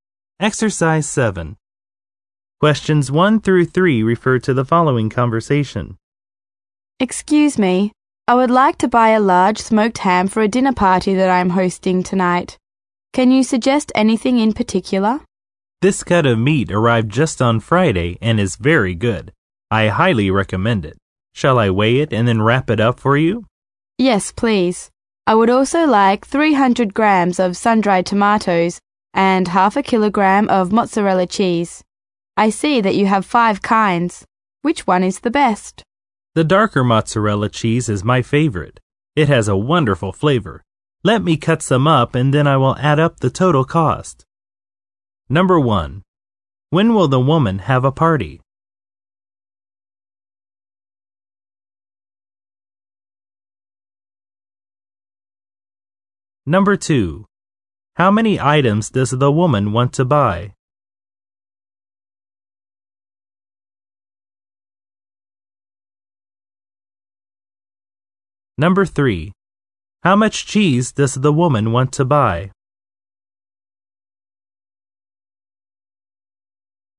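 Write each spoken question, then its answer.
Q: When will the woman have a party?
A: Tonight

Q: How many items does the woman want to buy?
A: Three (ham, sun-dried tomatoes, mozzarella cheese)

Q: How much cheese does the woman want to buy?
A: Half a kilogram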